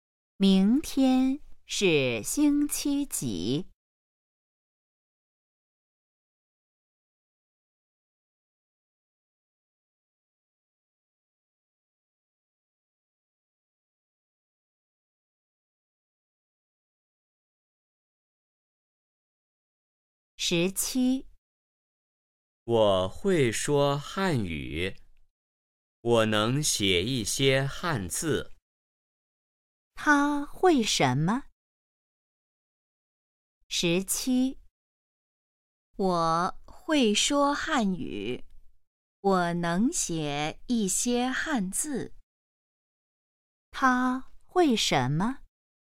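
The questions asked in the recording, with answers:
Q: 他会什么?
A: 说汉语,写一些汉字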